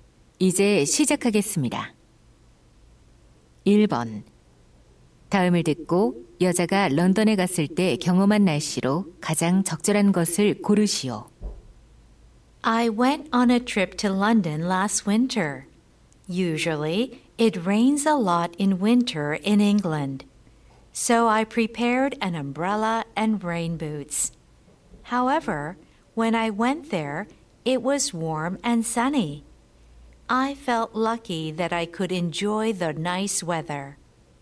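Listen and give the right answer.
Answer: 따뜻하고 맑은 날씨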